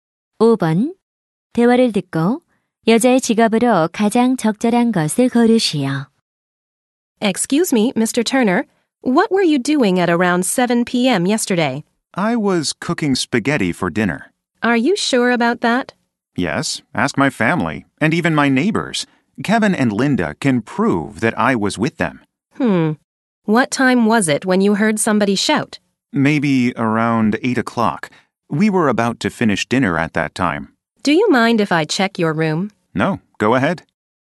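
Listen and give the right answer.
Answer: 형사(경찰관)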